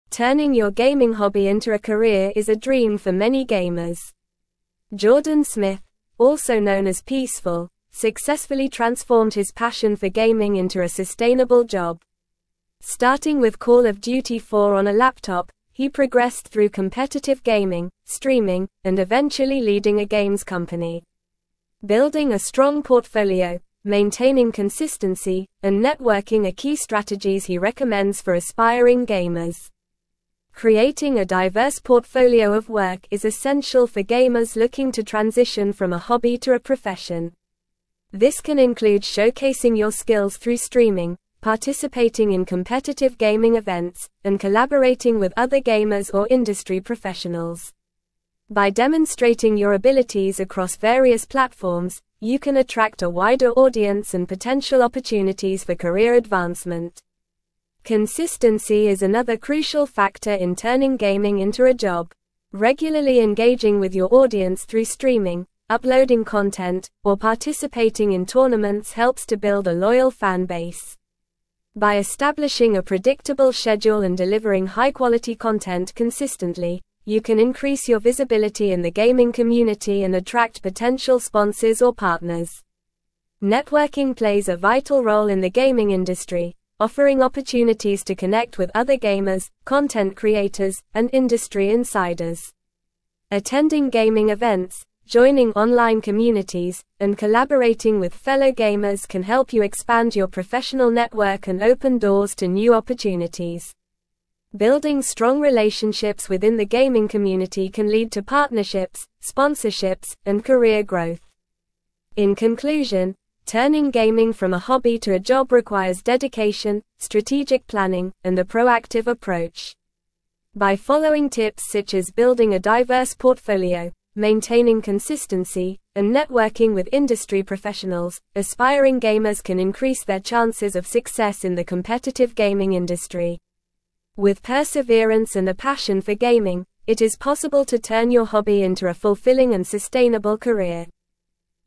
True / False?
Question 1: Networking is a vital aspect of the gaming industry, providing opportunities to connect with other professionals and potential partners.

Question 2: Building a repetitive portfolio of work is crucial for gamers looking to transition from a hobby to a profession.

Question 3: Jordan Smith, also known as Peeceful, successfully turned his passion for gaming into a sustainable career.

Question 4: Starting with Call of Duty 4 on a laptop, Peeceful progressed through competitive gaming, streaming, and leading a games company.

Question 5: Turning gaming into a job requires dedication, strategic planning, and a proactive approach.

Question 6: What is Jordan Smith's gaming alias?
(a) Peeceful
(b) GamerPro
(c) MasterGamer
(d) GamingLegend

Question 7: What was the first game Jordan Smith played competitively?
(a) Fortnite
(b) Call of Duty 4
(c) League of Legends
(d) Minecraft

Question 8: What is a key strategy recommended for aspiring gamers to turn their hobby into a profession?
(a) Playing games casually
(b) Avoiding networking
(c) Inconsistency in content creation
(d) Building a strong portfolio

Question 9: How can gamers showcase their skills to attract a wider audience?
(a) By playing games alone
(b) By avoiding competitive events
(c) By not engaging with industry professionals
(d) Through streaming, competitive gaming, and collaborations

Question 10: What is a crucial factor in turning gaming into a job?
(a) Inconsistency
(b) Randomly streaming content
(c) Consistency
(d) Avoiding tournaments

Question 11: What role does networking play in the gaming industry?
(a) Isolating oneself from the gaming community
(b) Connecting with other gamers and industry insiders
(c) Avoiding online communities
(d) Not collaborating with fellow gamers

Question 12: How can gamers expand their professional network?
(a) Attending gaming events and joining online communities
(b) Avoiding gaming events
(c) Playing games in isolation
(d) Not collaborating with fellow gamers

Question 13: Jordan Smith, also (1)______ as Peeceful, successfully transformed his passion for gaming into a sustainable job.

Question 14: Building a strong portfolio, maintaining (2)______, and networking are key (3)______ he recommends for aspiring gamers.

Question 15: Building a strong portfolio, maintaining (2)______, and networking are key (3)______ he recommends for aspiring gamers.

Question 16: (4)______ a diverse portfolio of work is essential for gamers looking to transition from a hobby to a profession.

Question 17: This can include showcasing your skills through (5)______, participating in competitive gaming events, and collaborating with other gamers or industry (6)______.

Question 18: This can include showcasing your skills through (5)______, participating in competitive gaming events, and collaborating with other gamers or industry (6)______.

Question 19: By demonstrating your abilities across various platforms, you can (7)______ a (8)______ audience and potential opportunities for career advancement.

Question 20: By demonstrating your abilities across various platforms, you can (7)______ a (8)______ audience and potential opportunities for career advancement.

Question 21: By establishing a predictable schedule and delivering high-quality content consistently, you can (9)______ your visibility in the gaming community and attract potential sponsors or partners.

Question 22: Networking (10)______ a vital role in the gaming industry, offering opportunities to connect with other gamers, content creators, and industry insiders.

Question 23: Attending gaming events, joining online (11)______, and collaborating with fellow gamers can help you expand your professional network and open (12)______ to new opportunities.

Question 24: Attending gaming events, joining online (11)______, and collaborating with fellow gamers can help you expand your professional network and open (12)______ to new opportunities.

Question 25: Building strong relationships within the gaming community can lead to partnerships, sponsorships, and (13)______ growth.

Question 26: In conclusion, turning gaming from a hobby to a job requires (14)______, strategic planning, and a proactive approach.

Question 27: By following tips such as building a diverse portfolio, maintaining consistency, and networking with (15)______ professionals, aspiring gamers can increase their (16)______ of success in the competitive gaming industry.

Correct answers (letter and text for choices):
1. True
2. False
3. True
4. True
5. True
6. (a) Peeceful
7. (b) Call of Duty 4
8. (d) Building a strong portfolio
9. (d) Through streaming, competitive gaming, and collaborations
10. (c) Consistency
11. (b) Connecting with other gamers and industry insiders
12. (a) Attending gaming events and joining online communities
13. known
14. consistency
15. strategies
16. Creating
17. streaming
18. professionals
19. attract
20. wider
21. increase
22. plays
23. communities
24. doors
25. career
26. dedication
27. chances

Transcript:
Turning your gaming hobby into a career is a dream for many gamers. Jordan Smith, also known as Peeceful, successfully transformed his passion for gaming into a sustainable job. Starting with Call of Duty 4 on a laptop, he progressed through competitive gaming, streaming, and eventually leading a games company. Building a strong portfolio, maintaining consistency, and networking are key strategies he recommends for aspiring gamers.
Creating a diverse portfolio of work is essential for gamers looking to transition from a hobby to a profession. This can include showcasing your skills through streaming, participating in competitive gaming events, and collaborating with other gamers or industry professionals. By demonstrating your abilities across various platforms, you can attract a wider audience and potential opportunities for career advancement.
Consistency is another crucial factor in turning gaming into a job. Regularly engaging with your audience through streaming, uploading content, or participating in tournaments helps to build a loyal fan base. By establishing a predictable schedule and delivering high-quality content consistently, you can increase your visibility in the gaming community and attract potential sponsors or partners.
Networking plays a vital role in the gaming industry, offering opportunities to connect with other gamers, content creators, and industry insiders. Attending gaming events, joining online communities, and collaborating with fellow gamers can help you expand your professional network and open doors to new opportunities. Building strong relationships within the gaming community can lead to partnerships, sponsorships, and career growth.
In conclusion, turning gaming from a hobby to a job requires dedication, strategic planning, and a proactive approach. By following tips such as building a diverse portfolio, maintaining consistency, and networking with industry professionals, aspiring gamers can increase their chances of success in the competitive gaming industry. With perseverance and a passion for gaming, it is possible to turn your hobby into a fulfilling and sustainable career.

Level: Level 4